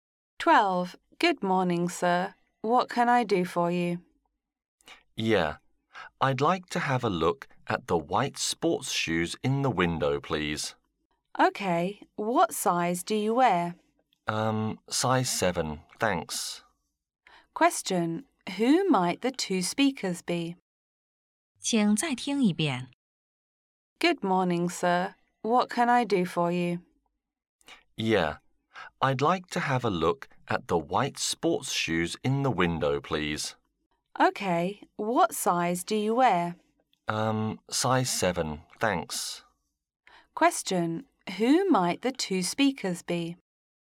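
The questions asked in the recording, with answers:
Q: Who might the two speakers be?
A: A shop assistant and a customer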